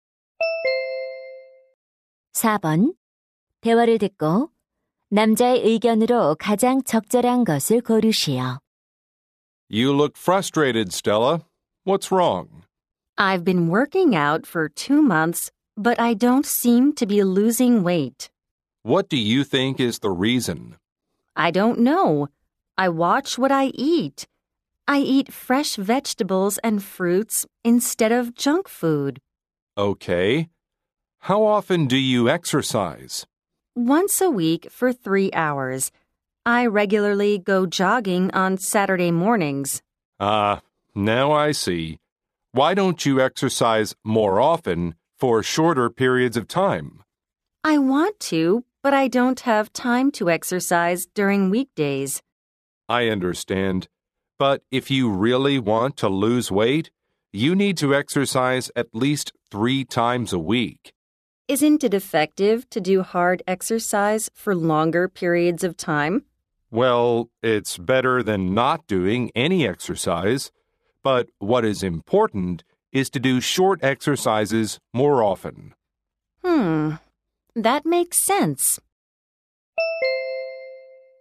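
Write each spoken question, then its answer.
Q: 대화를 듣고 남자의 의견으로 가장 적절한 것을 고르시오.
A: 체중을 줄이려면 짧게 자주 운동하는 것이 중요하다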